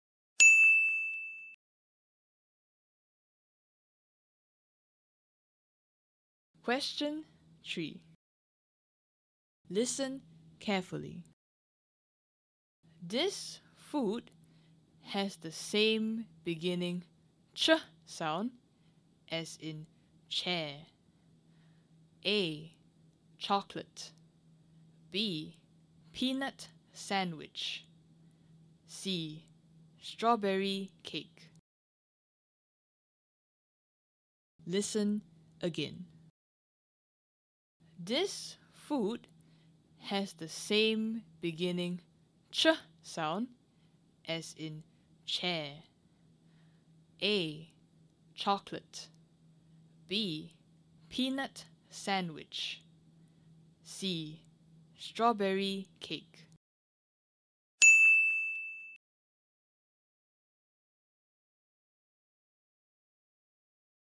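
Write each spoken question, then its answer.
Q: This food has the same beginning ch sound as in chair.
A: A: Chocolate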